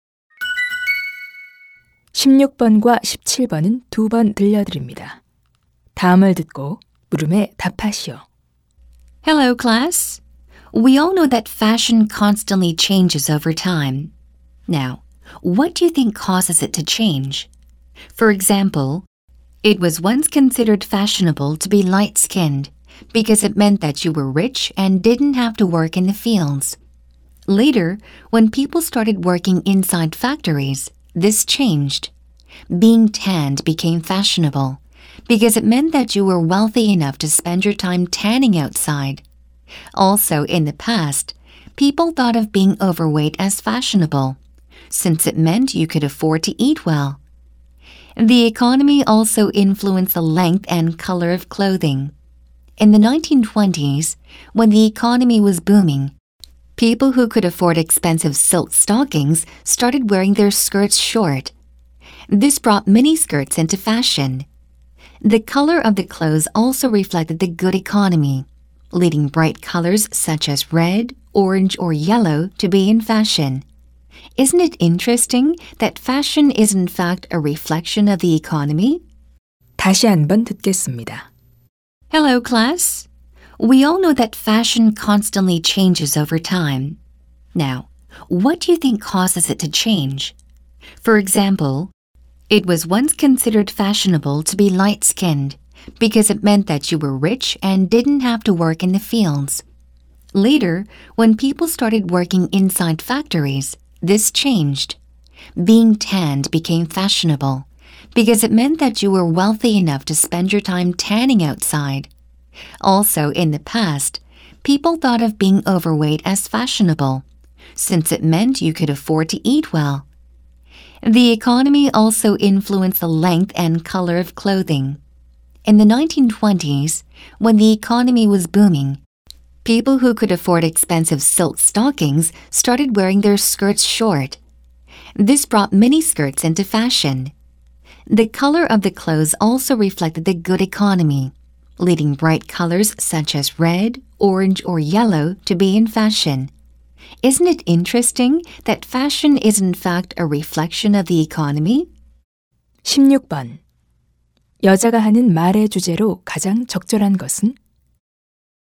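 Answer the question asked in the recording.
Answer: 경제가 패션 유행에 미치는 영향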